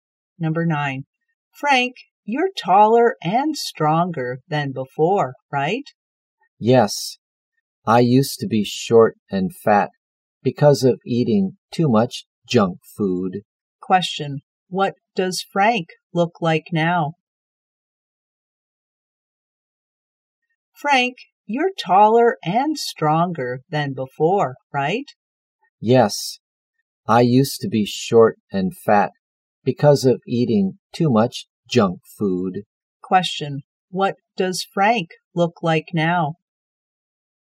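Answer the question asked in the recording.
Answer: Tall and strong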